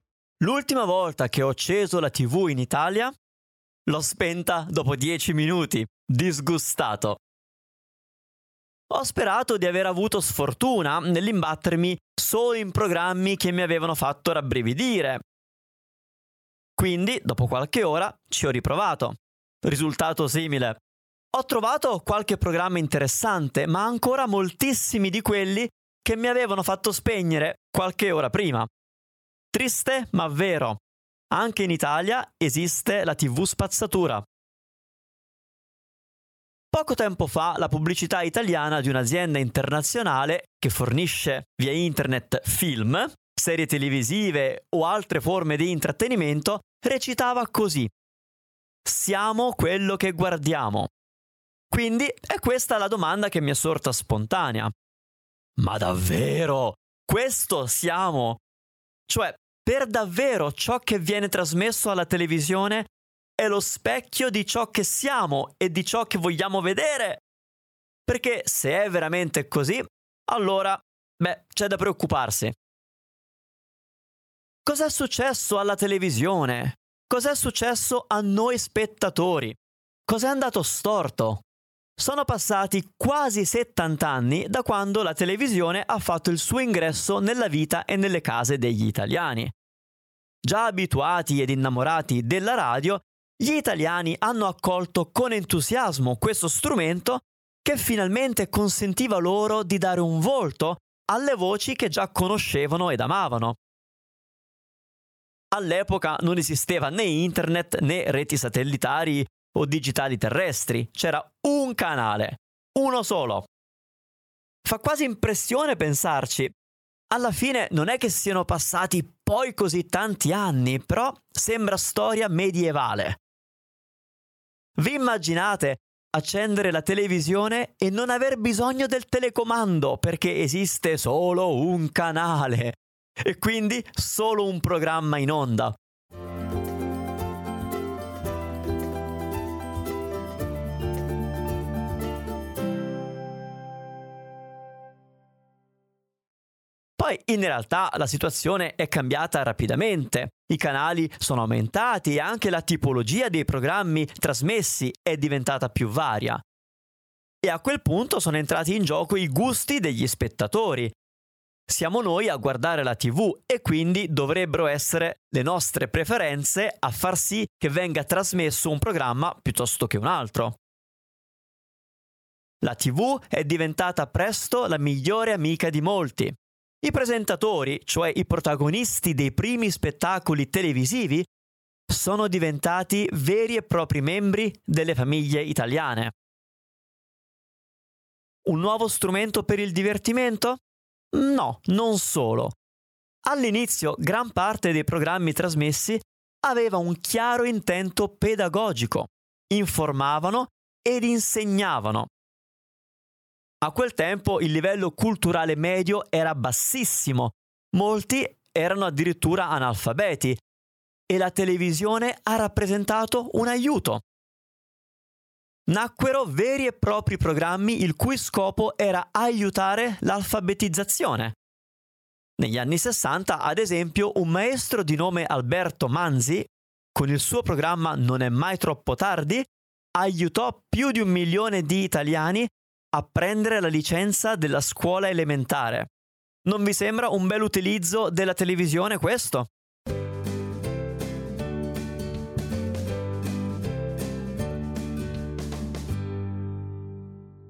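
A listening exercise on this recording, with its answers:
Here are your TRUE/ FALSE Comprehension questions.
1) In Italia la TV spazzatura è sempre esistita, fin dalle origini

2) Gli italiani sono stati subito entusiasti della TV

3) All'inizio la TV italiana aveva un solo canale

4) I primi spettacoli della TV italiana erano solo una forma di divertimento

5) La televisione in Italia ha aiutato a combattere l'analfabetismo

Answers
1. Falso
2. Vero
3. Vero
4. Falso
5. Vero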